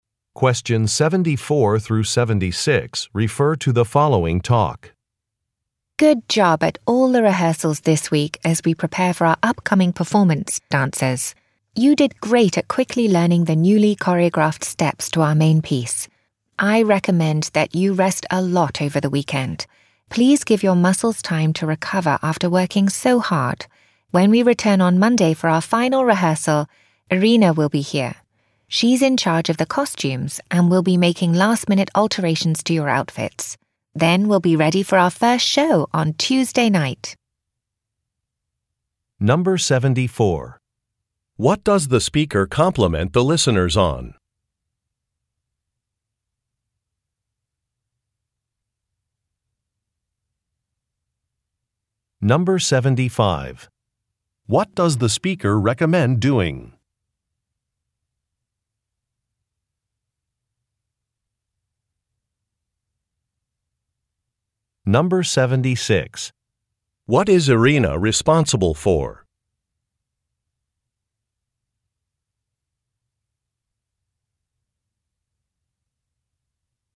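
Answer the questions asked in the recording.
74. Quickly learning the newly choreographed dance steps
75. Resting a lot over the weekend
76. The costumes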